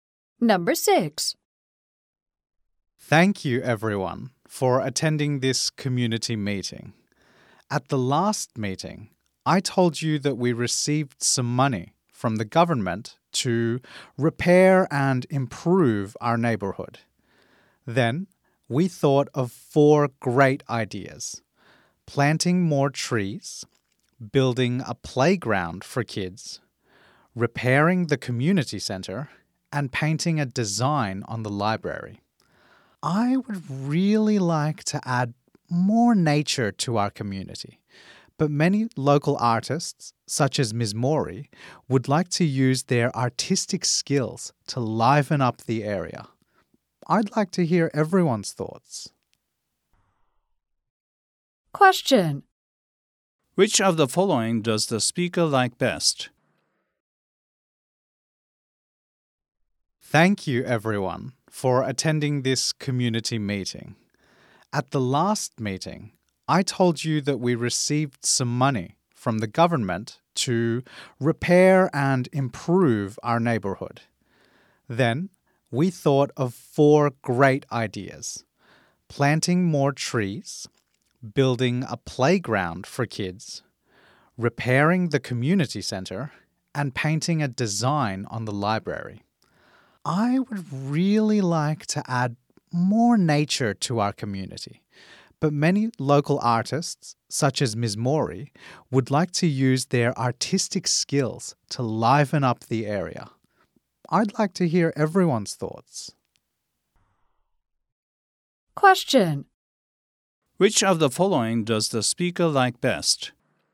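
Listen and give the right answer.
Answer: Planting more trees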